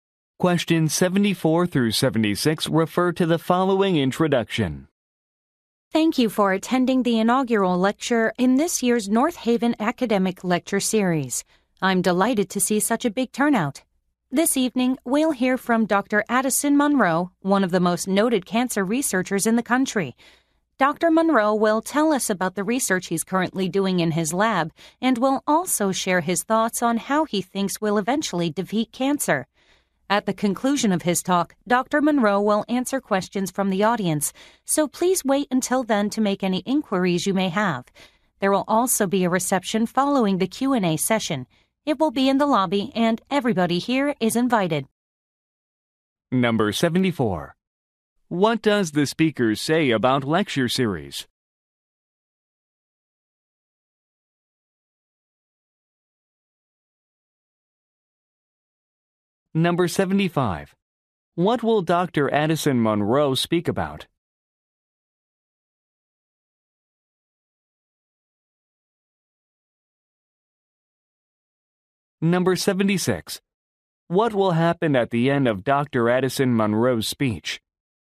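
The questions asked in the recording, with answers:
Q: What does the speaker say about lecture series?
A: This is its first (inaugural) lecture this year

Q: What will Dr. Addison Munro speak about?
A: His cancer research and how cancer will be defeated

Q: What will happen at the end of Dr. Addison Munro's speech?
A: He will answer audience questions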